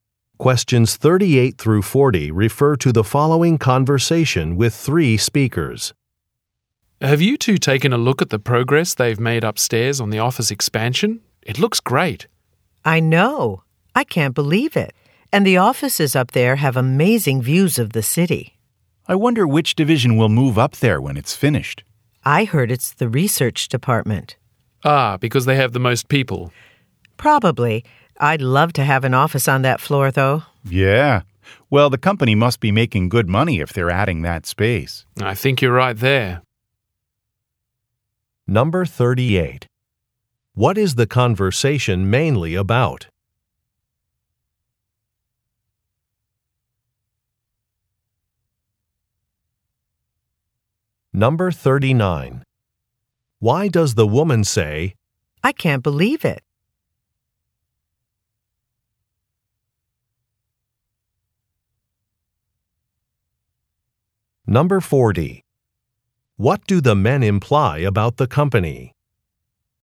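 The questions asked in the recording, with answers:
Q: What is the conversation mainly about?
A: The office expansion upstairs

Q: What do the men imply about the company?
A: It is making good money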